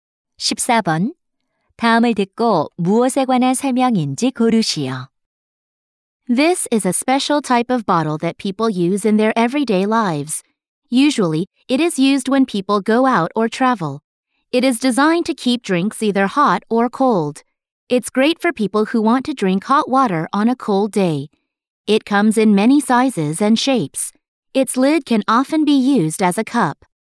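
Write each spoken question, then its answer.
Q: 다음을 듣고 무엇에 관한 설명인지 고르시오.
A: 보온병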